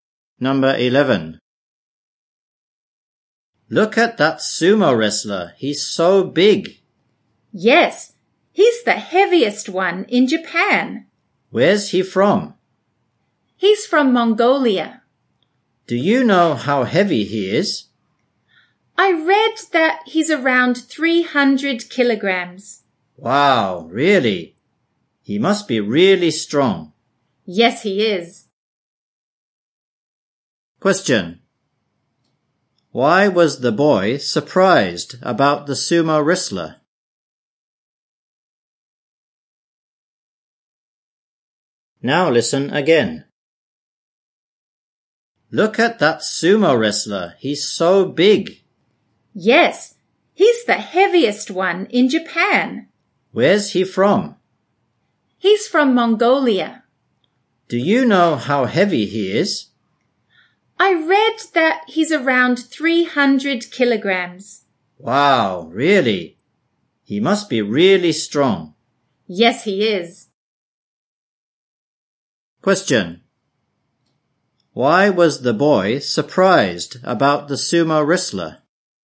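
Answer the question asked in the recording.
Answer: He weighs around 300 kilograms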